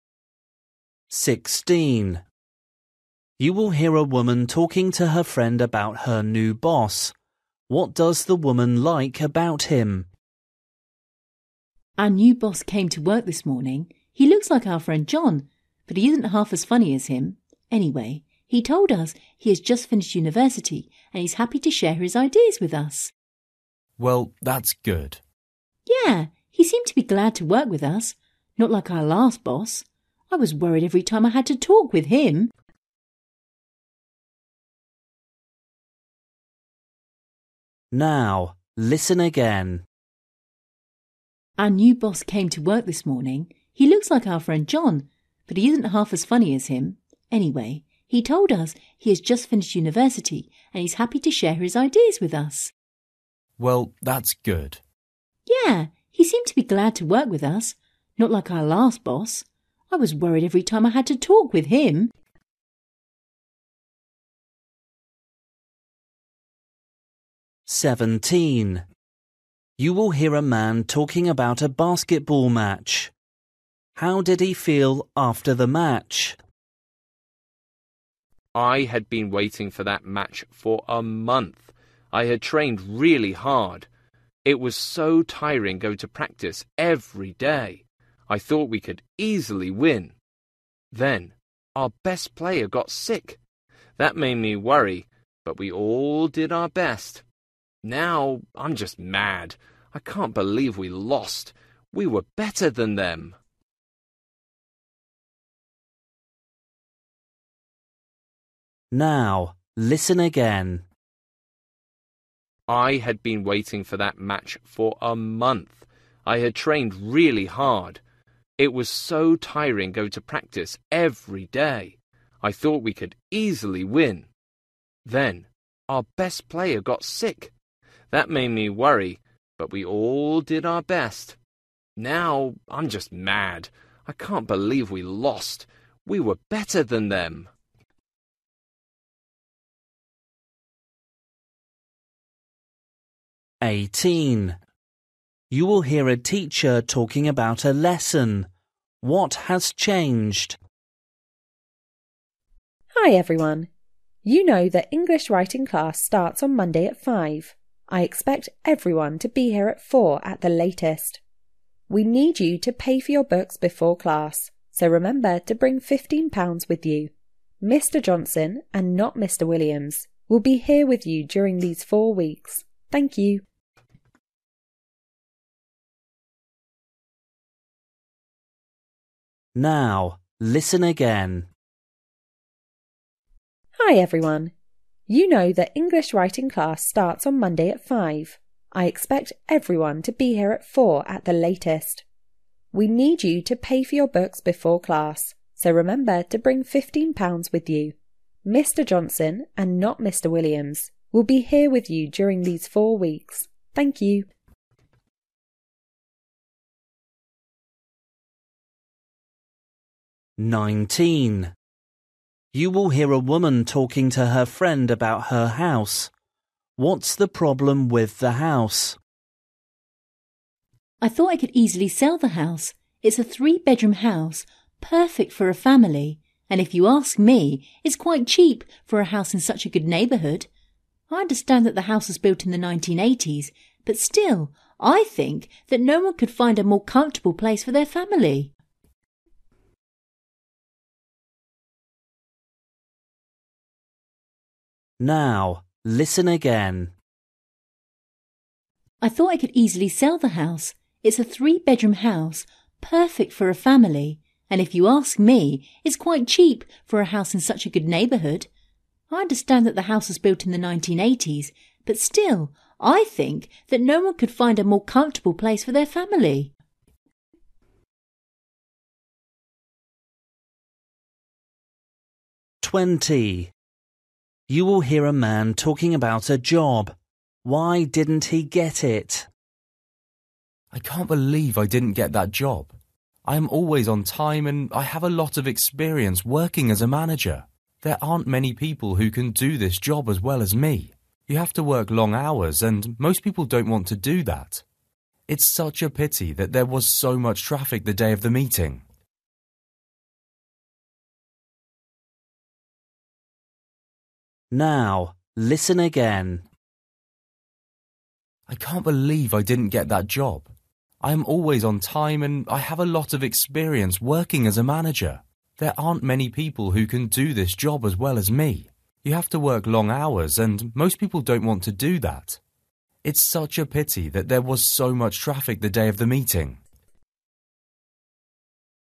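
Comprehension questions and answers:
For each question, choose the correct answer.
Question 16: You will hear a woman talking to her friend about her new boss. What does the woman like about him?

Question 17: You will hear a man talking about a basketball match. How did he feel after the match?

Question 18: You will hear a teacher talking about a lesson. What has changed?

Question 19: You will hear a woman talking to her friend about her house. What's the problem with the house?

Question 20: You will hear a man talking about a job. Why didn't he get it?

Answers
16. He is friendly and happy to work with them and share his ideas.
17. Angry
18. The teacher: Mr Johnson will teach instead of Mr Williams
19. It is old (built in the 1980s)
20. He was late for the meeting because of traffic

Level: Luyện nghe trình độ A2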